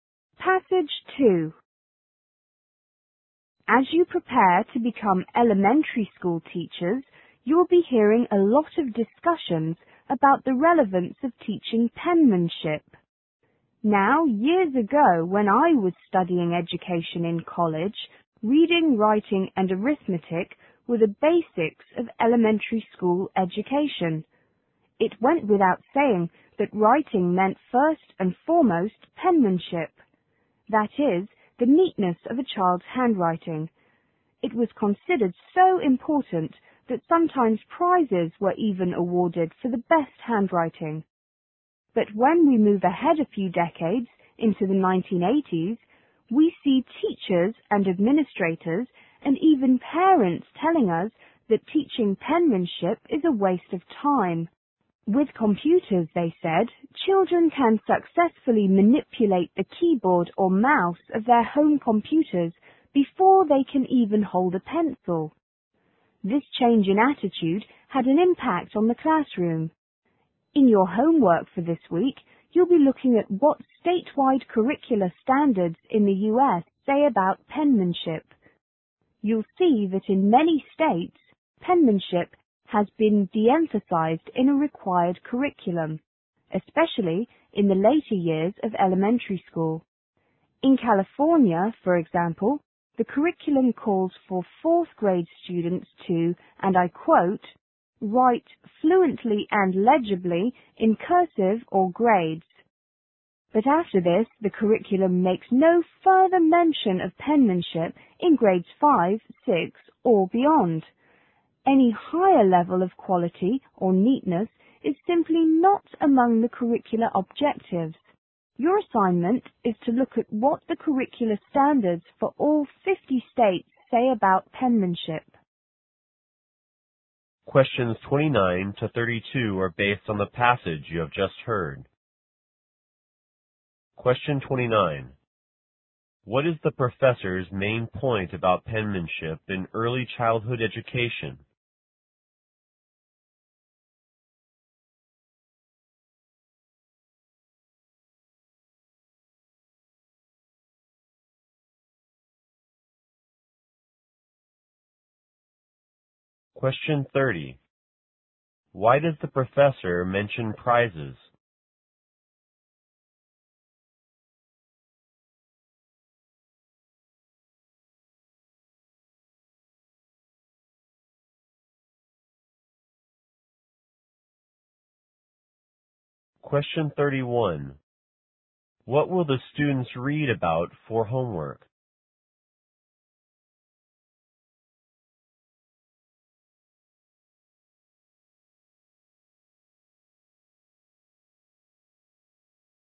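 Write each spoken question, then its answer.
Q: What is the professor's main point about penmanship in early childhood education?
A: It has been de-emphasized in recent decades

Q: Why does the professor mention prizes?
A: To show that penmanship was once considered very important

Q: What will the students read about for homework?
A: What state curriculum standards say about penmanship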